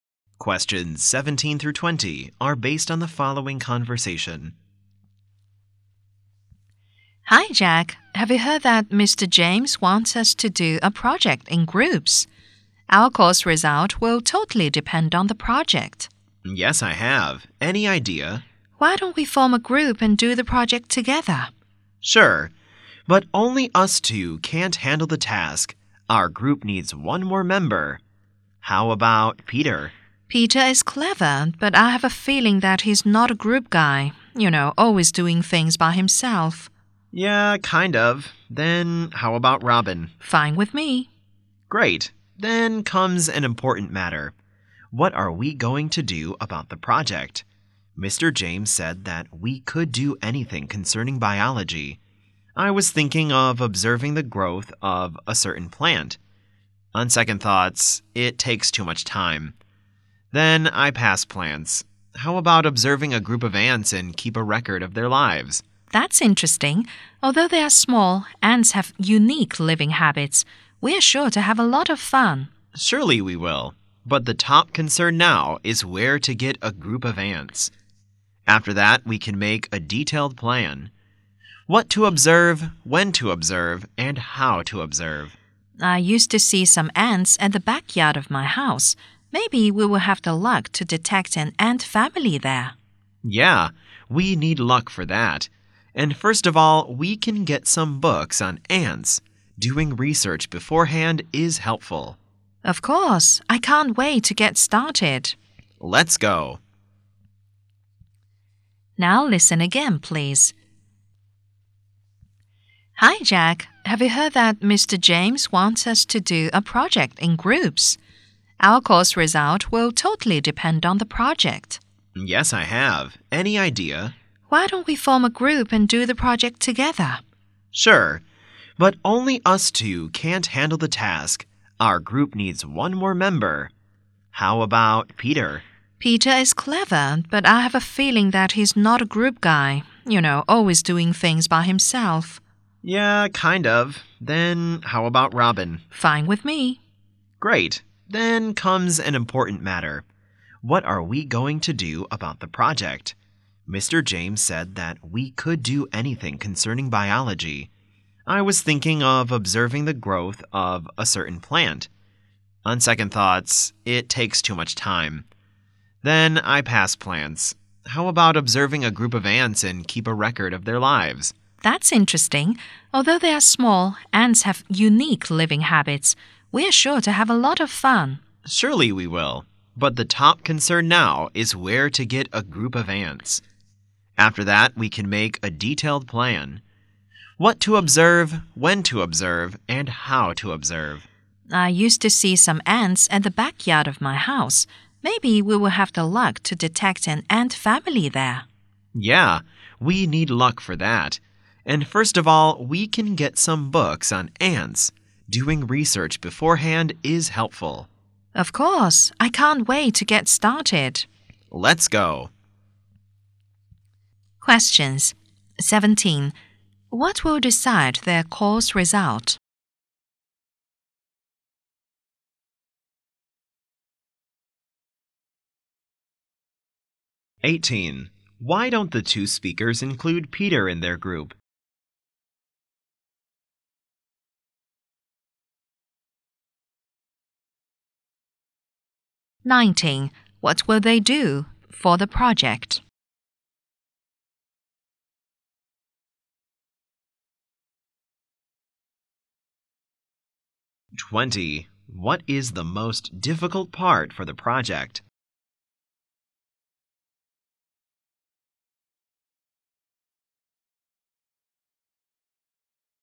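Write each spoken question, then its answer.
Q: What will decide their course result?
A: The group project

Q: Why don't the two speakers include Peter in their group?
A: He is not a team player; he always works by himself.

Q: What will they do for the project?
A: Observe a group of ants and keep a record of their lives.

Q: What is the most difficult part for the project?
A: Finding a group of ants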